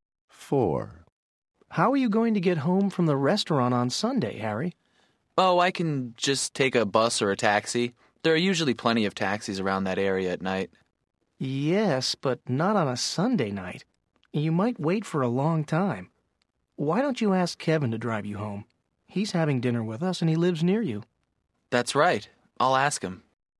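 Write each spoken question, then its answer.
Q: How are you going to get home from the restaurant on Sunday, Harry?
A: Kevin will drive him home (by car)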